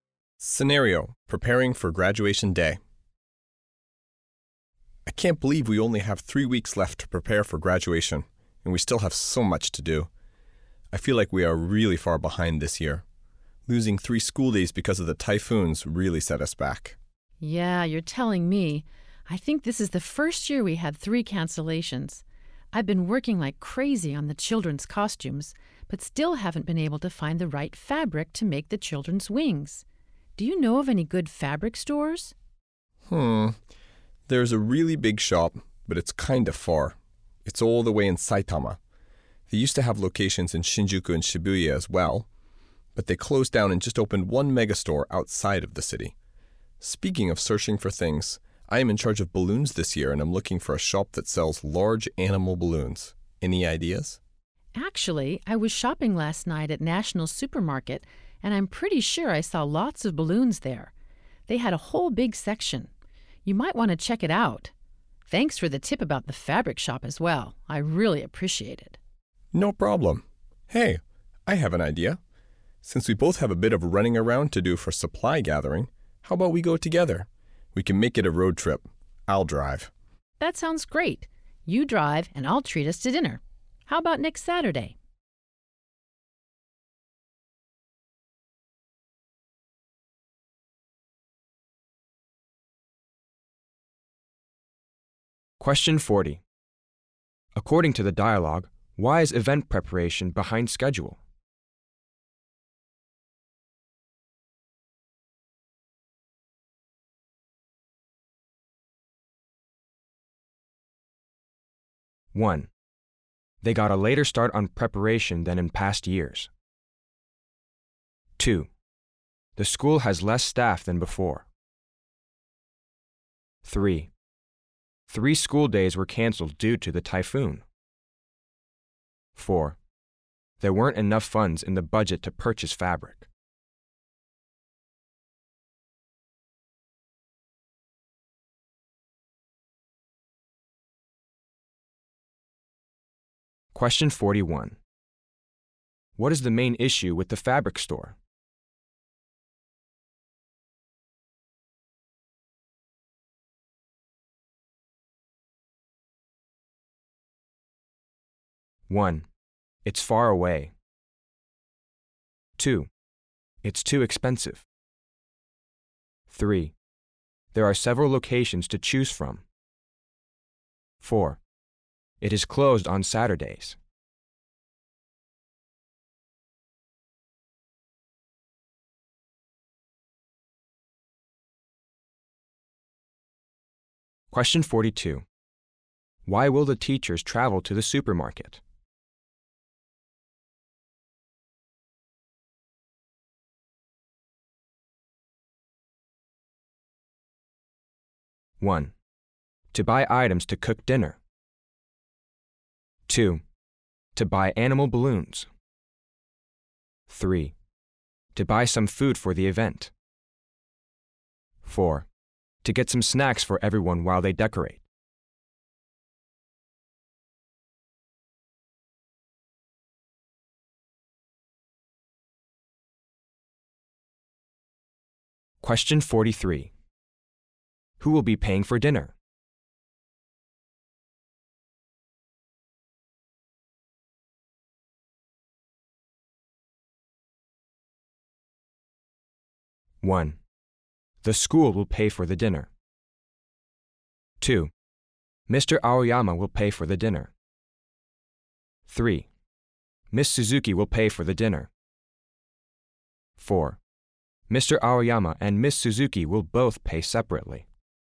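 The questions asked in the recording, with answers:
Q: According to the dialogue, why is event preparation behind schedule?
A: 3: 3 school days were canceled due to the typhoon.

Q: What is the main issue with the fabric store?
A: 1: it's far away.

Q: Why will the teachers travel to the supermarket?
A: 2: to buy animal balloons.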